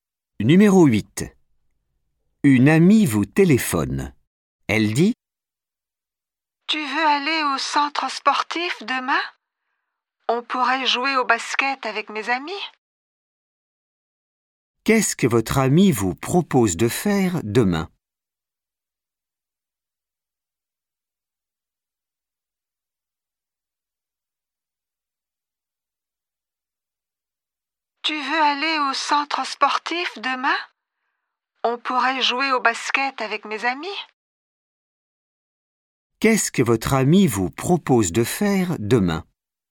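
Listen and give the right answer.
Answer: Jouer au basket au centre sportif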